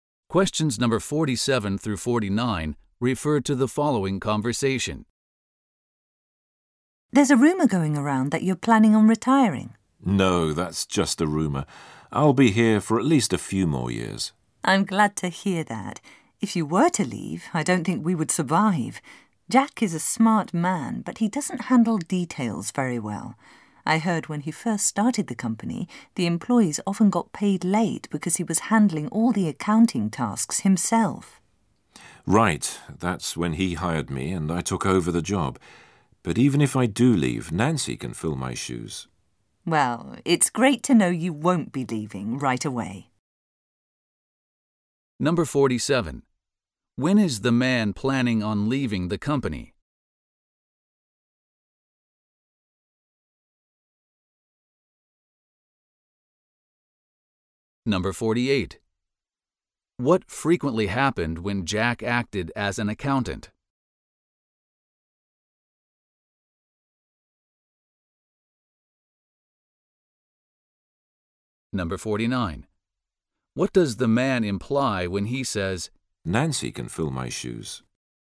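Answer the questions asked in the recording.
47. Not for at least a few more years
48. Employees were paid late
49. Nancy could do his job if he left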